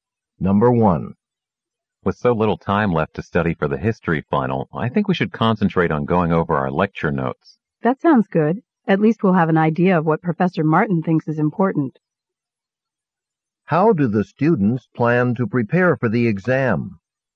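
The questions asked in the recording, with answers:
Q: How do the students plan to prepare for the exam?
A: By going over their lecture notes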